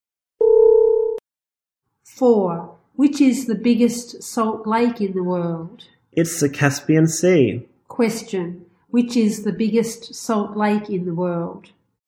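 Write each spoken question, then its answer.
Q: Which is the biggest salt lake in the world?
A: The Caspian Sea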